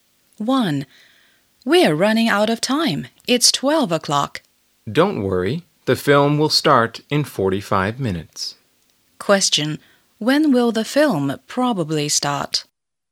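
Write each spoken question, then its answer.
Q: When will the film probably start?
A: At 12:45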